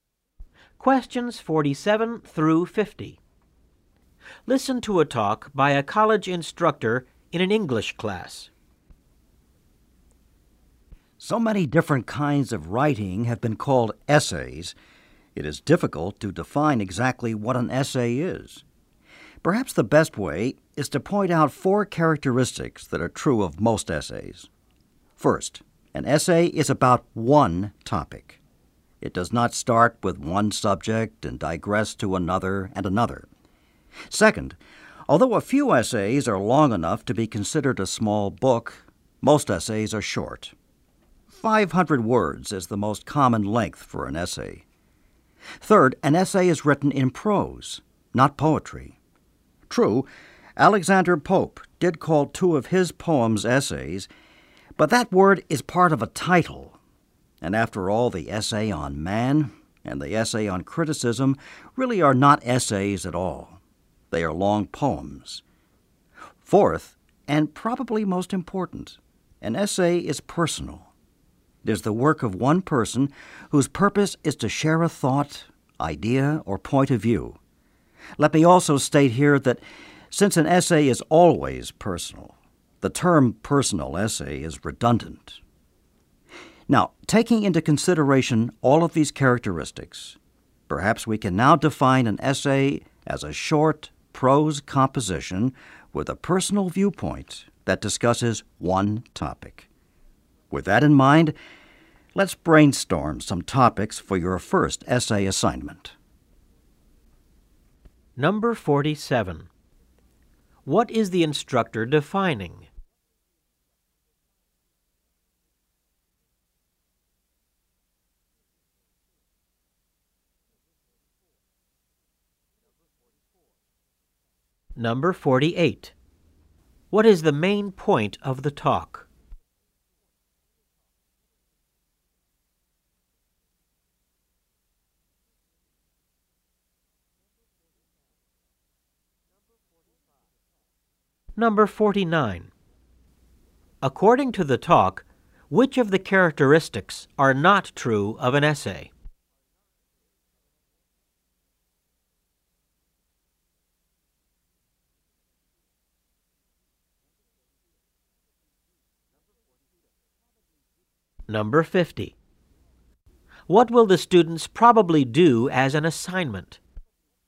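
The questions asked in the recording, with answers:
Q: What is the instructor defining?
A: An essay

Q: What is the main point of the talk?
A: The characteristics of an essay

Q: What will the students probably do as an assignment?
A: Write an essay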